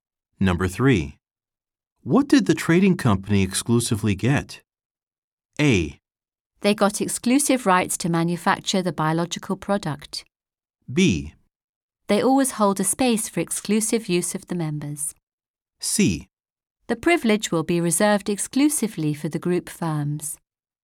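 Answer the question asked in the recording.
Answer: A: They got exclusive rights to manufacture the biological product.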